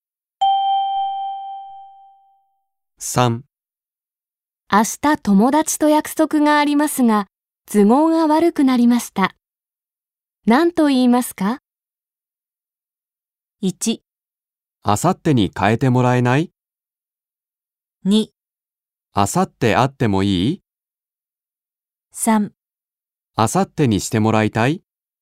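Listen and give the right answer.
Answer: 1: 明後日に変えてもらえない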